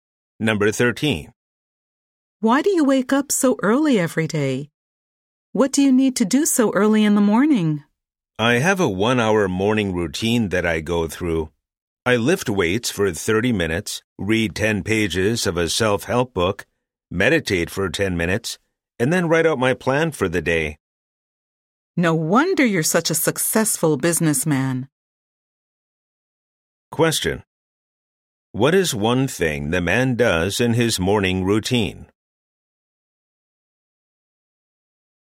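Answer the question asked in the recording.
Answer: He lifts weights (or reads, meditates, or plans his day)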